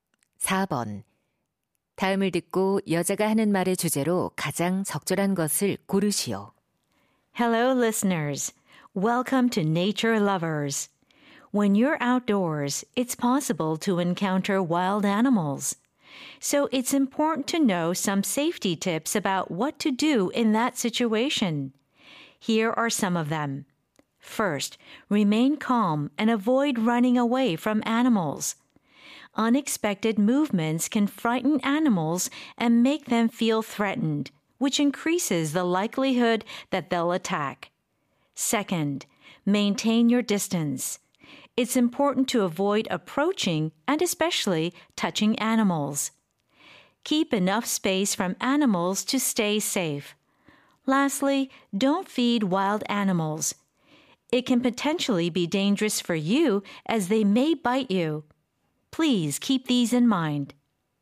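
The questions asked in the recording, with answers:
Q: 다음을 듣고 여자가 하는 말의 주제로 가장 적절한 것을 고르시오.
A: 야생 동물을 마주쳤을 때의 안전 수칙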